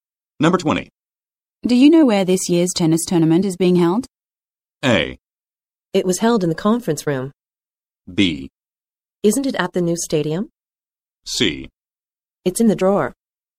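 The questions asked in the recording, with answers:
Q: Do you know where this year's tennis tournament is being held?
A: B: Isn't it at the new stadium?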